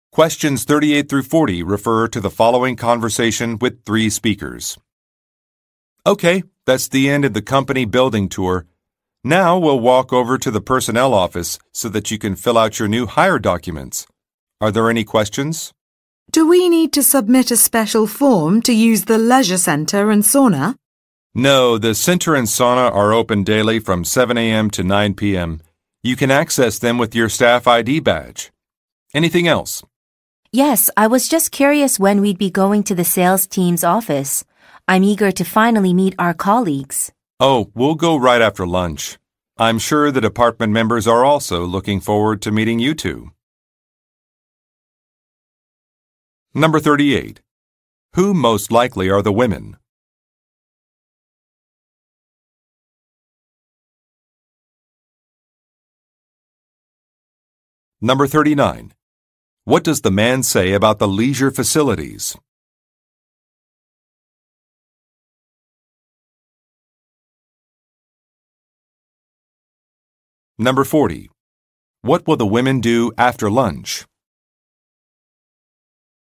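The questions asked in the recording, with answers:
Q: Who most likely are the women?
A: New employees

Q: What does the man say about the leisure facilities?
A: They can be accessed with a staff ID badge; no special form is needed

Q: What will the women do after lunch?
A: Go to the sales team's office to meet their colleagues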